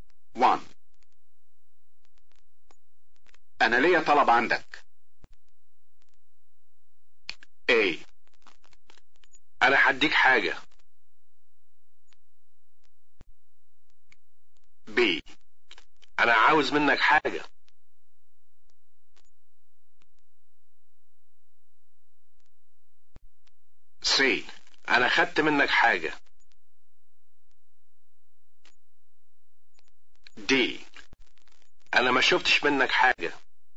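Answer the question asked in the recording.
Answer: B: أنا عاوز منك حاجة.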